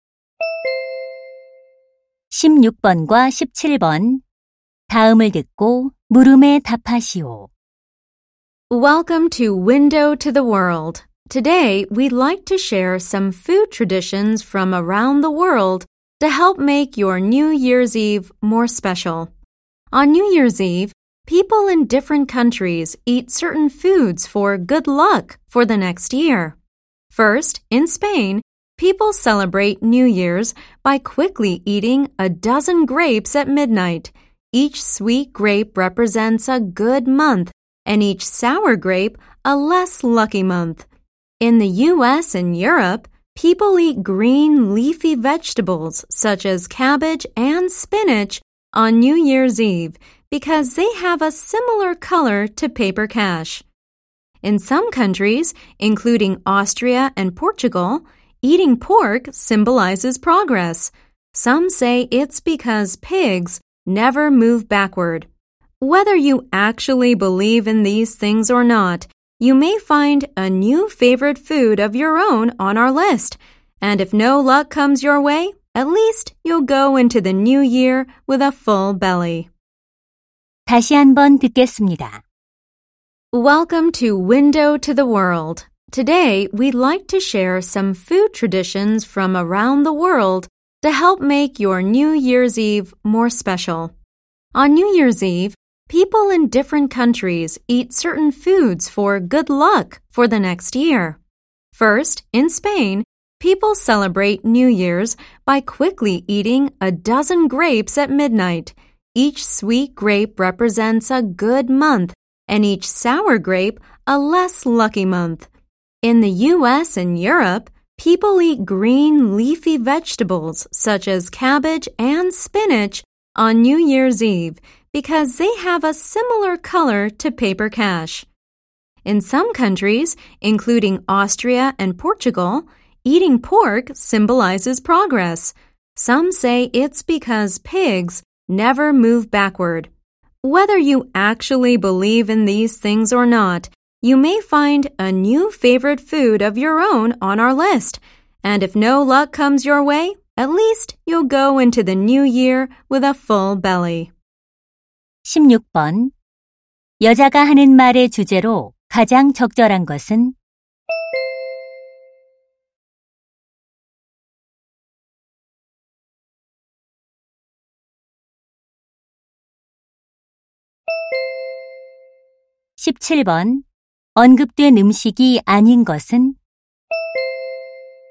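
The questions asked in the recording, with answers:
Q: 여자가 하는 말의 주제로 가장 적절한 것은?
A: 새해 전날 행운을 위해 여러 나라에서 먹는 음식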